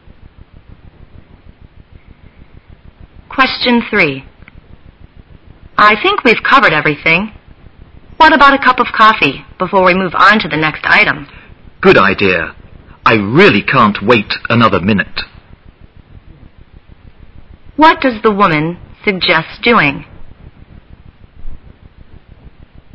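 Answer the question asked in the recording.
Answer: Having a cup of coffee before moving on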